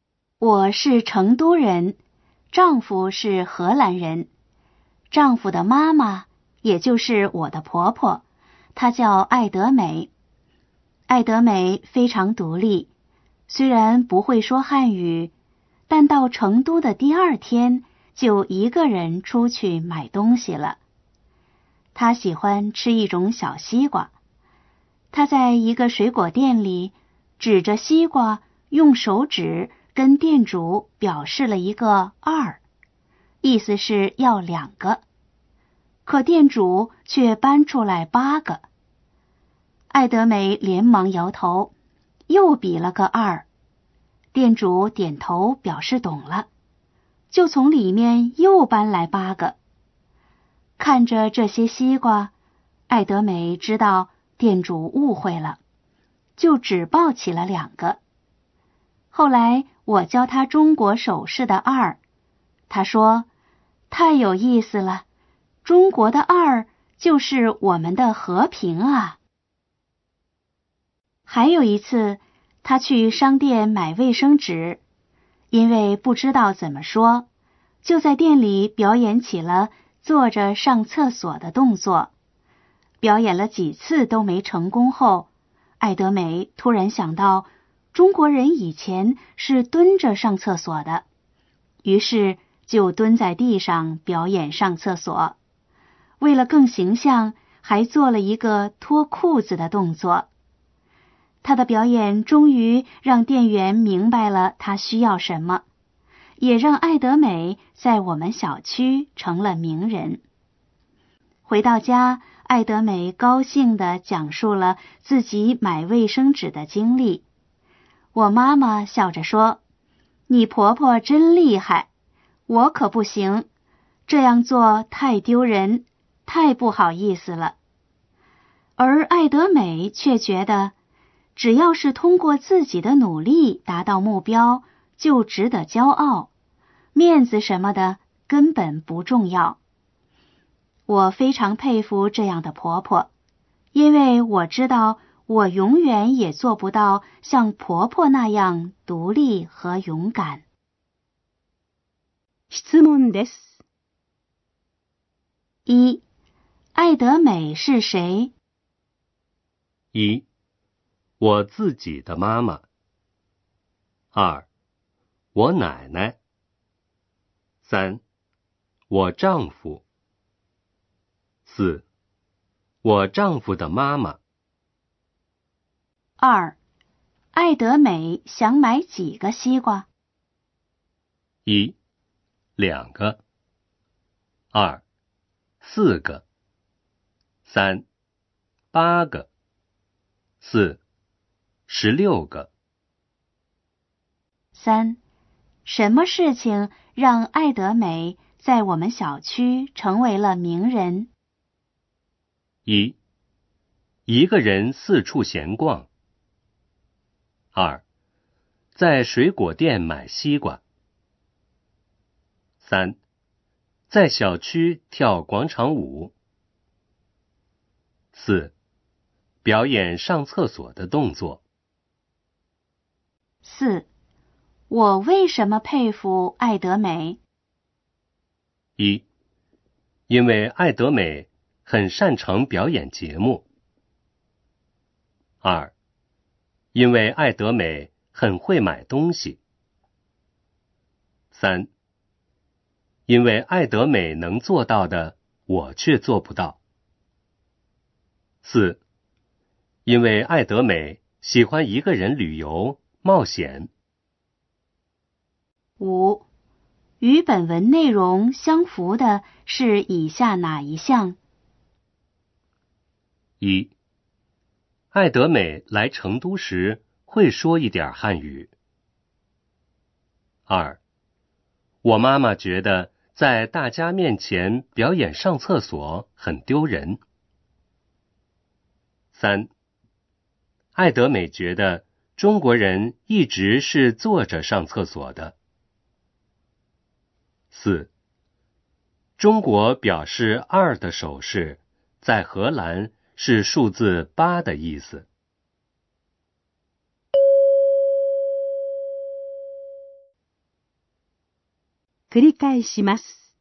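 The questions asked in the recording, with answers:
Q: 艾德美是谁?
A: 4: 我丈夫的妈妈。

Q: 艾德美想买几个西瓜?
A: 1: 两个。

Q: 什么事情让艾德美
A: 4: 表演上厕所的动作。

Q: 我为什么佩服爱德美?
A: 3: 因为爱德美能做到的,我却做不到。

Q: 与本文内容相符的是以下哪一项?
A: 2: 我妈妈觉得在大家面前表演上厕所很丢人。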